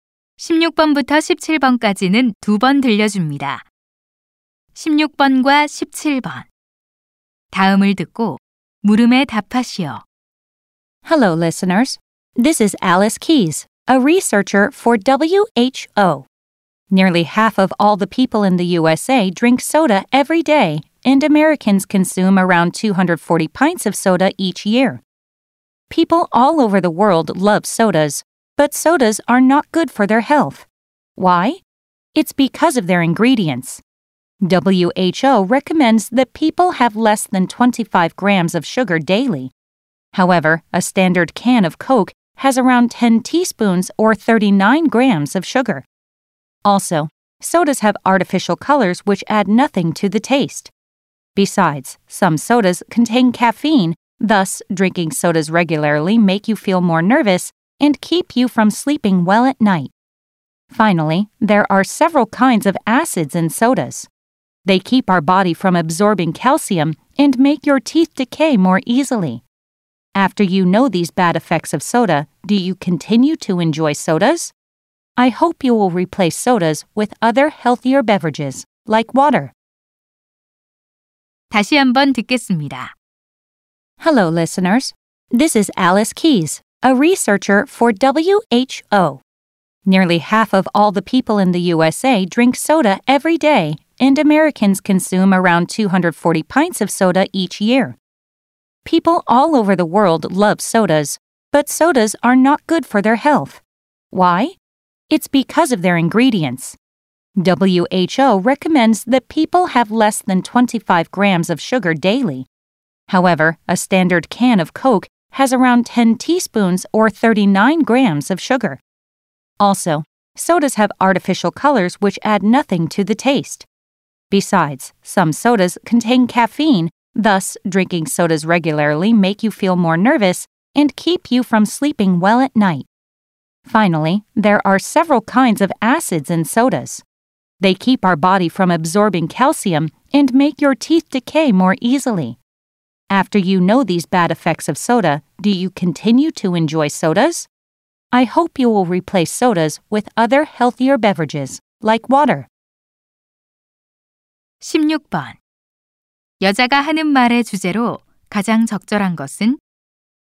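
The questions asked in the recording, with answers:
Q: 여자가 하는 말의 주제로 가장 적절한 것은?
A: 탄산음료가 건강에 미치는 해로운 영향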